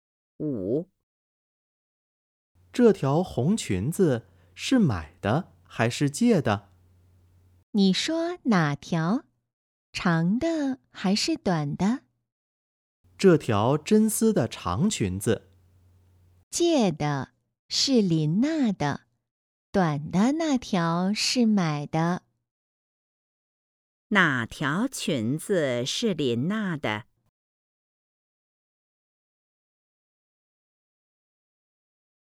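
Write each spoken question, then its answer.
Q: 哪条裙子是林娜的?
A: 真丝的长裙子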